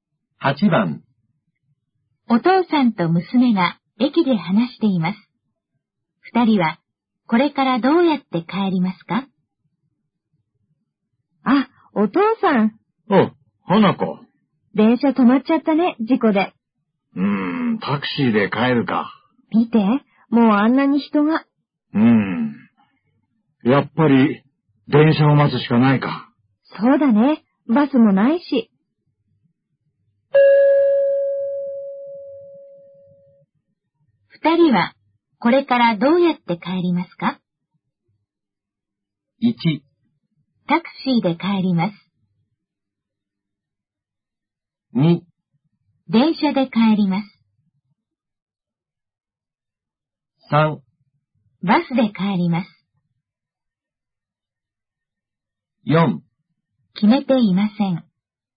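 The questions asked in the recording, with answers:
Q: 二人はこれからどうやって帰りますか?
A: 2: 電車で帰ります。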